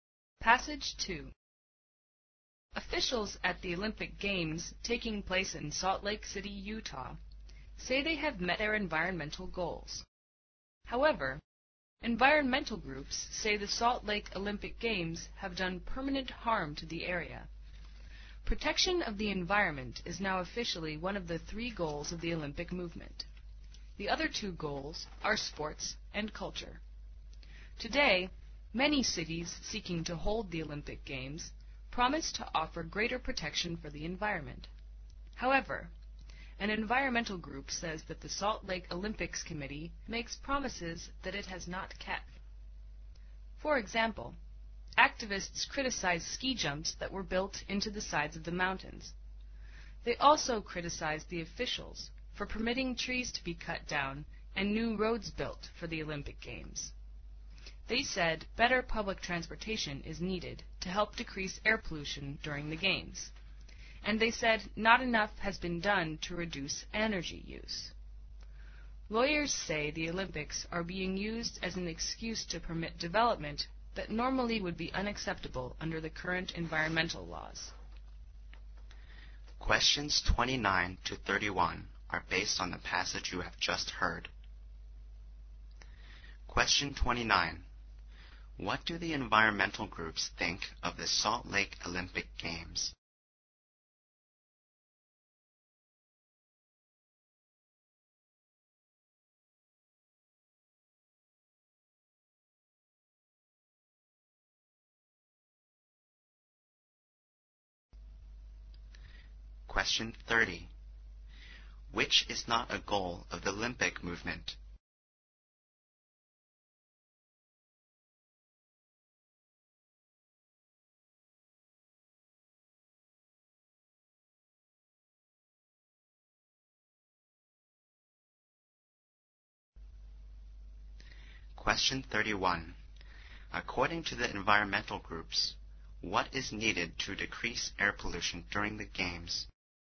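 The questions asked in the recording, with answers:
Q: What do the environmental groups think of the Salt Lake Olympic Games?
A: They have done permanent harm to the area

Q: According to the environmental groups, what is needed to decrease air pollution during the Games?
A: Better public transportation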